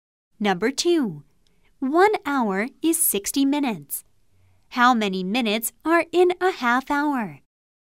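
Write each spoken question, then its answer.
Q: How many minutes are in a half hour?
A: 30 minutes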